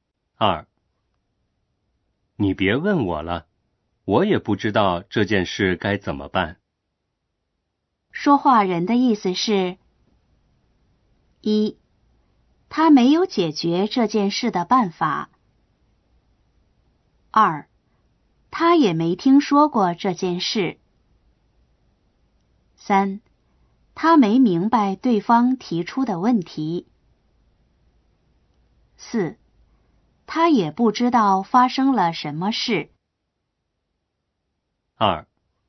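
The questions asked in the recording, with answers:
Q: 说话人的意思是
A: 1: 他没有解决这件事的办法。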